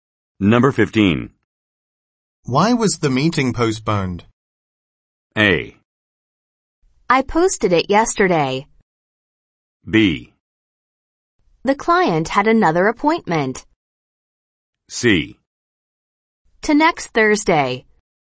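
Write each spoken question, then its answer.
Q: Why was the meeting postponed?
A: B: The client had another appointment.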